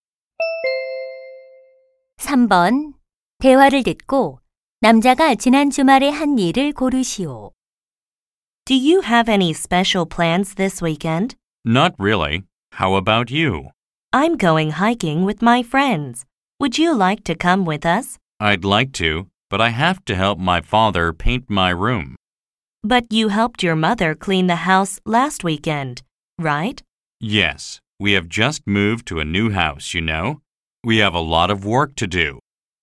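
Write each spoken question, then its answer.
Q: 대화를 듣고 남자가 지난 주말에 한 일을 고르시오.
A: 엄마를 도와 집 청소하기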